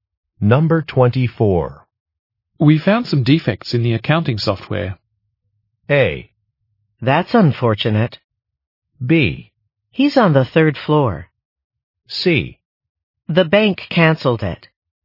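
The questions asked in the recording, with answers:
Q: We found some defects in the accounting software.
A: A: That's unfortunate.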